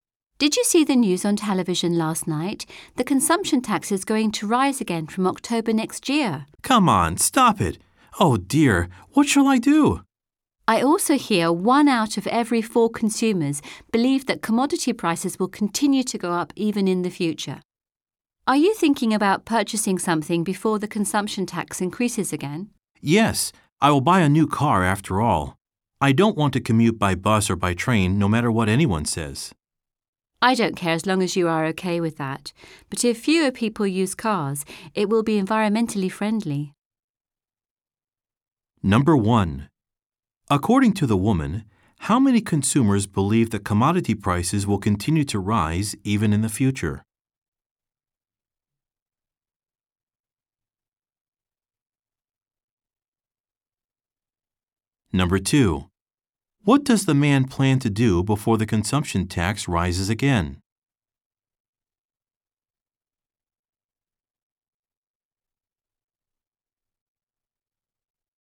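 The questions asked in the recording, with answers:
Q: According to the woman, how many consumers believe that commodity prices will continue to rise even in the future?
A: One out of every four

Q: What does the man plan to do before the consumption tax rises again?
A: Buy a new car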